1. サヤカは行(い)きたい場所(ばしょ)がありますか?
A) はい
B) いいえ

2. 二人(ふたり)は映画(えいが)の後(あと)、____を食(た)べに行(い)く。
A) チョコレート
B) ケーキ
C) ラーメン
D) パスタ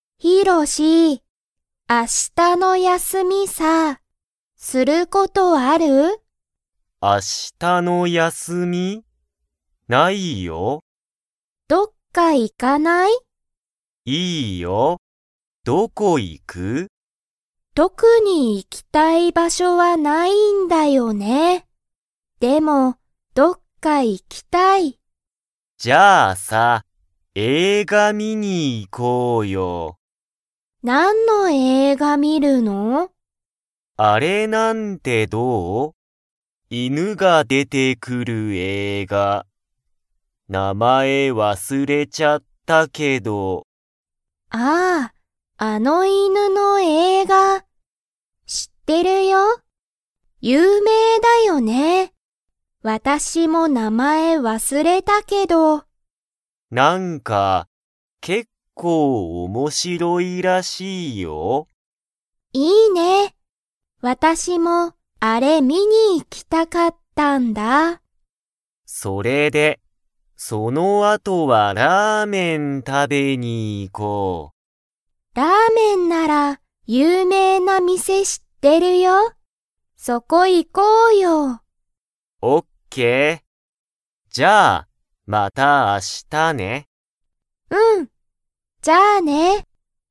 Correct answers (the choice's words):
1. いいえ
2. ラーメン

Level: Level 2